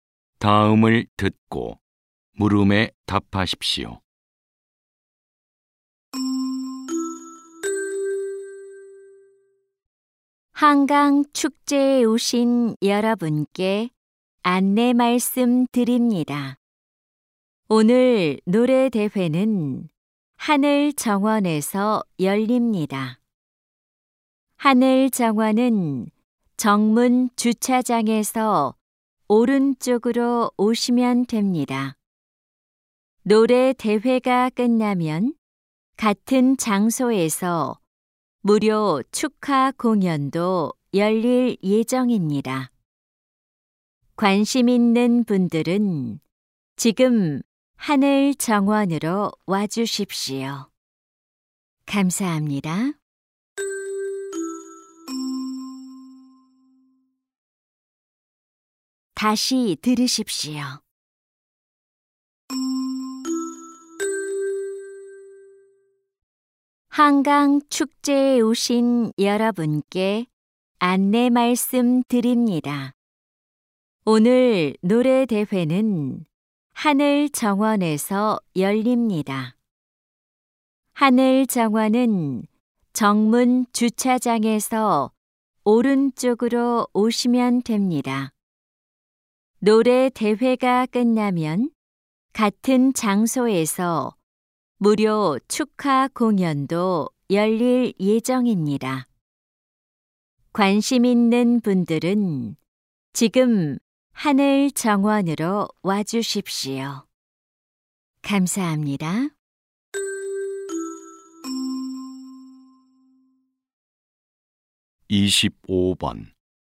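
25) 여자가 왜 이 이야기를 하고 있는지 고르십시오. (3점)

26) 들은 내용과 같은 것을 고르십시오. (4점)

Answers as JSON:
{"25": "노래 대회 장소(하늘 정원)를 안내하려고", "26": "노래 대회가 끝나면 같은 장소에서 무료 축하 공연이 열린다."}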